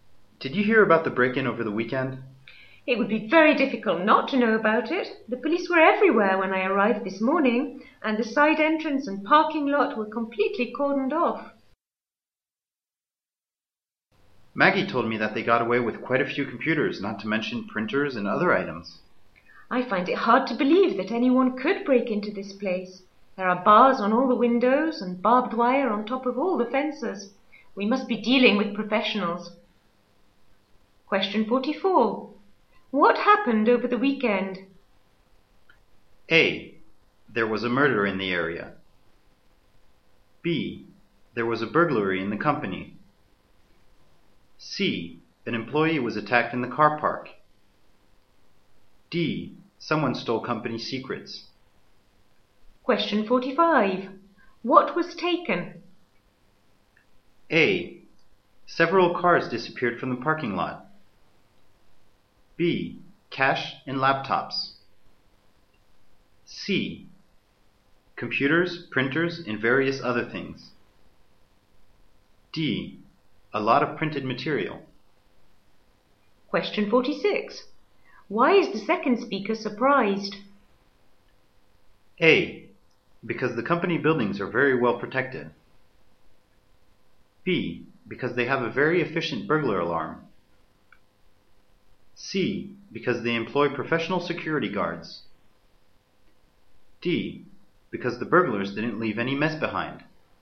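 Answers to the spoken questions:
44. B: There was a burglary in the company.
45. C: Computers, printers, and various other things.
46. A: Because the company buildings are very well protected.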